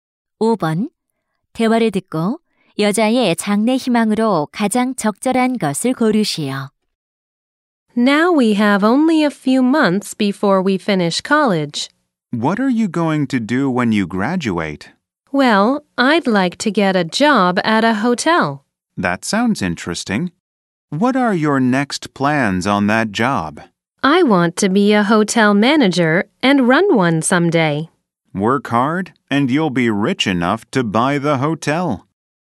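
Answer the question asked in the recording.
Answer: 호텔 지배인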